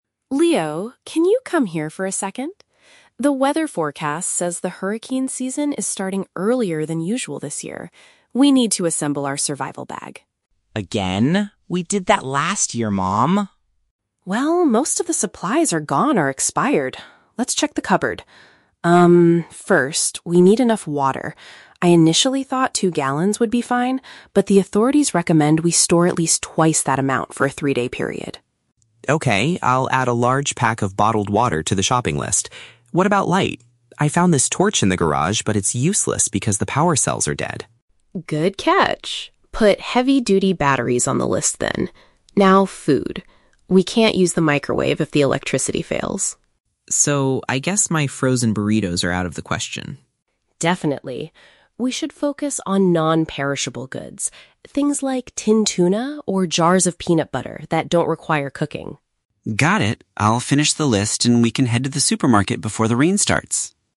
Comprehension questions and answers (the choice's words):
Listen to the conversation and choose the correct answer (A, B, or C).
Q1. How much water does the mother want to store now?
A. Two gallons.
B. Four gallons.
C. Six gallons.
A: Four gallons.

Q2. What is the problem with the torch Leo found?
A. It is broken and cannot be fixed.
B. It was left in the garage for too long.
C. It does not have working batteries.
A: It does not have working batteries.

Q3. What type of food does the mother suggest buying?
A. Meals that are kept in the freezer.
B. Food that stays good without refrigeration.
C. Items that need to be cooked quickly.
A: Food that stays good without refrigeration.

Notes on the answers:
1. The mother says she first thought "two gallons" was enough but then says they need "twice that amount" (2 x 2 = 4).
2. Leo uses the word "torch" (synonym for flashlight) and says "the power cells are dead". "Power cells" is a synonym for "batteries".
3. The mother suggests "non-perishable goods" and gives examples like "tinned tuna" which "don't require cooking" or a fridge.

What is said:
Gable: Leo, can you come here for a second? The weather forecast says the hurricane season is starting earlier than usual this year. We need to assemble our survival bag.
Leo: Again? We did that last year, Mom.
Gable: Well, most of the supplies are gone or expired. Let's check the cupboard. Um, first, we need enough water. I initially thought two gallons would be fine, but the authorities recommend we store at least twice that amount for a three-day period.
Leo: Okay, I'll add a large pack of bottled water to the shopping list. What about light? I found this torch in the garage, but it's useless because the power cells are dead.
Gable: Good catch. Put "heavy-duty batteries" on the list then. Now, food. We can't use the microwave if the electricity fails.
Leo: So, I guess my frozen burritos are out of the question?
Gable: Definitely. We should focus on non-perishable goods. Things like tinned tuna or jars of peanut butter that don't require cooking.